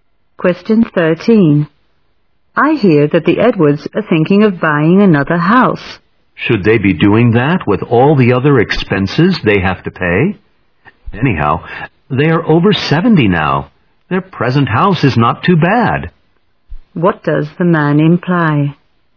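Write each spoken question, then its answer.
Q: What does the man imply?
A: The Edwards shouldn't buy another house.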